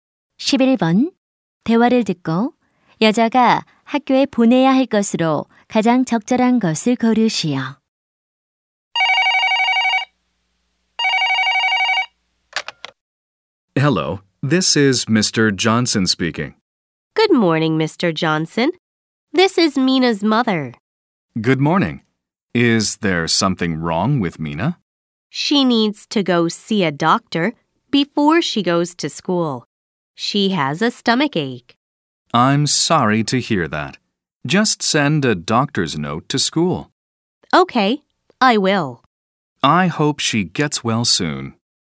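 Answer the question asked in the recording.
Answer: 진단서 (의사 소견서)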